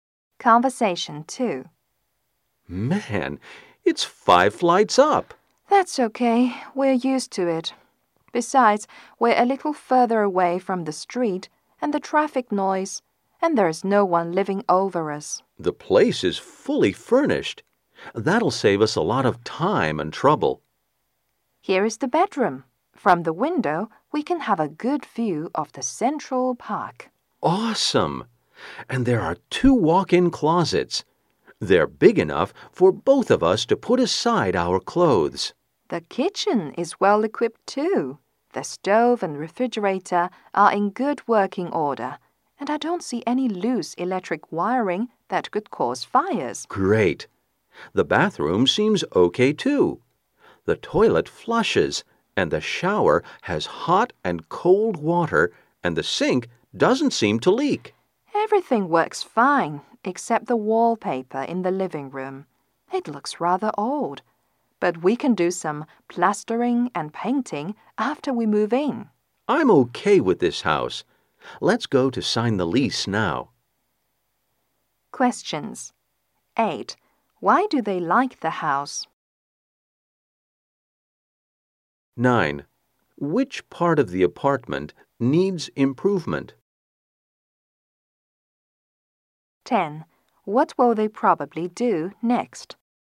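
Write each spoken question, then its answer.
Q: Which part of the apartment needs improvement?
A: The living room wallpaper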